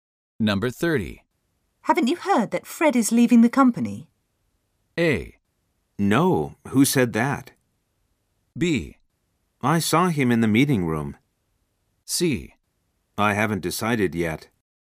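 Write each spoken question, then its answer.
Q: Haven't you heard that Fred is leaving the company?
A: A: No, who said that?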